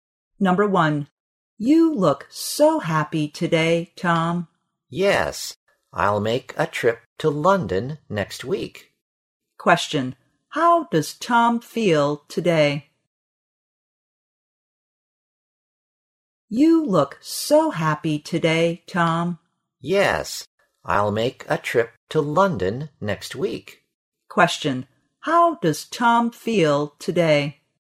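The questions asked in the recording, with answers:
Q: How does Tom feel today?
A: Happy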